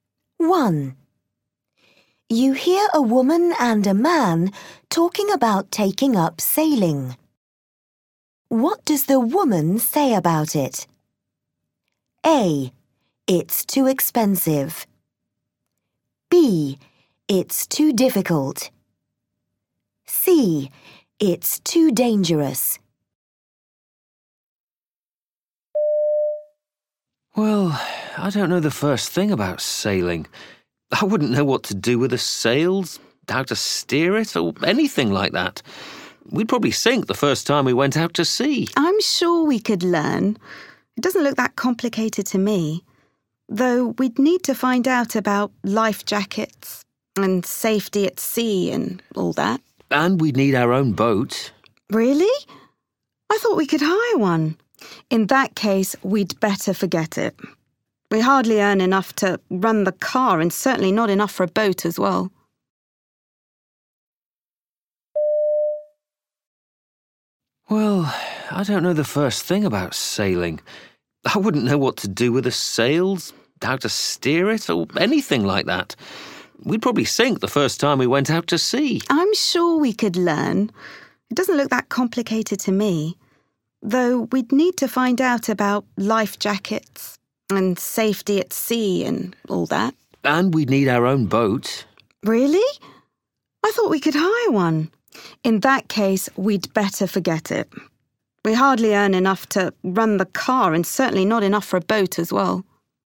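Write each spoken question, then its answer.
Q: What does the woman say about it?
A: A: It's too expensive.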